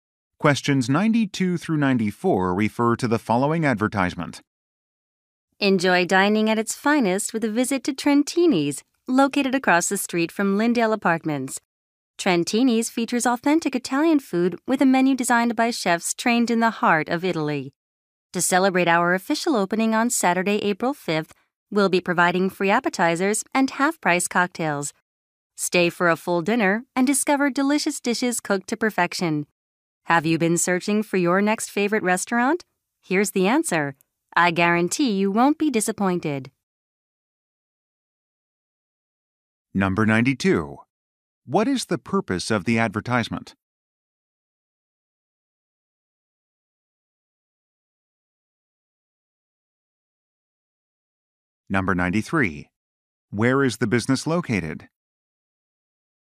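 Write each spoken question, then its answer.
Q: What is the purpose of the advertisement?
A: To promote a restaurant's opening

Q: Where is the business located?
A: Across the street from Lindale Apartments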